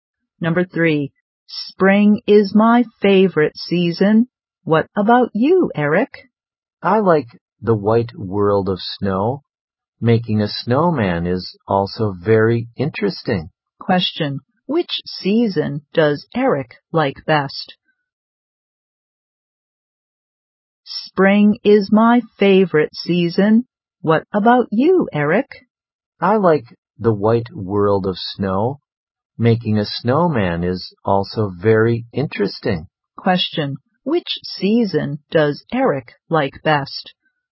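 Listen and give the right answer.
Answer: Winter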